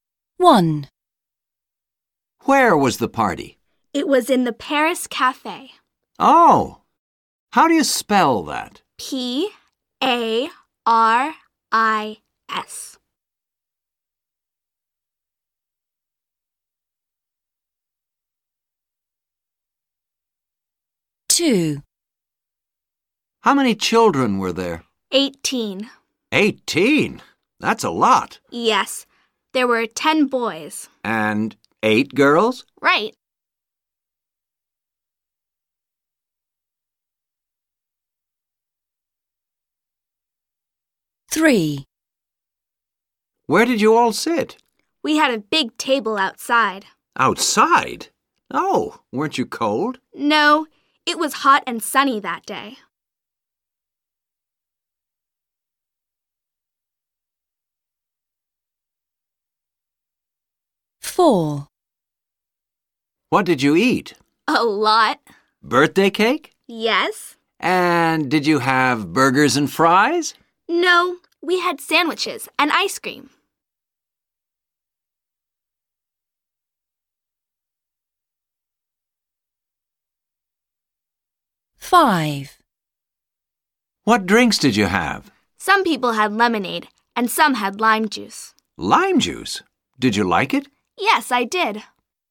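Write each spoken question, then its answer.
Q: Where was the party?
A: In the Paris Cafe

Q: How many children were there?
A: 18

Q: Where did you all sit?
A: At a big table outside

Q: What did you eat?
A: Birthday cake, sandwiches and ice cream

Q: What drinks did you have?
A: Lemonade and lime juice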